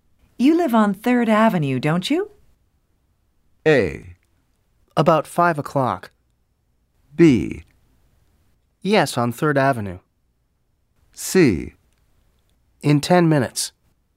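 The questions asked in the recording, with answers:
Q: You live on 3rd Avenue, don't you?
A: B: Yes, on 3rd Avenue.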